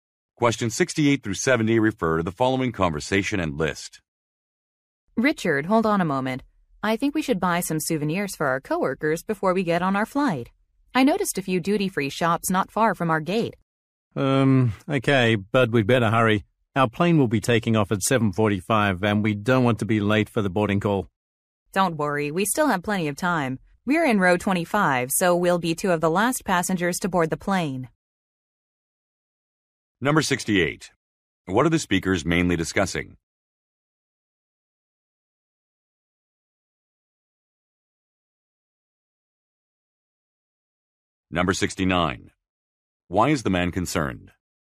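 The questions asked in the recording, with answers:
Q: What are the speakers mainly discussing?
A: Buying souvenirs for coworkers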